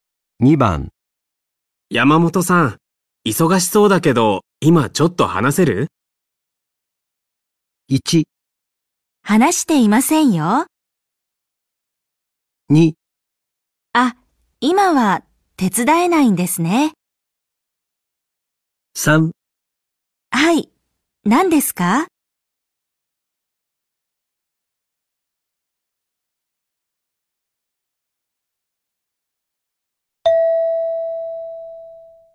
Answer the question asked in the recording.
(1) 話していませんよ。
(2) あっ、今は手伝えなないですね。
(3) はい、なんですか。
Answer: (3) はい、なんですか。

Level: N4 Listening · Test 1